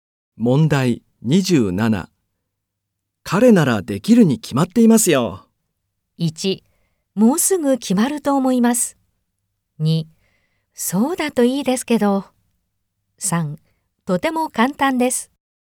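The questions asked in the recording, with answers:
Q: 彼ならできるに決まっていますよ。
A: 2: そうだといいですけど。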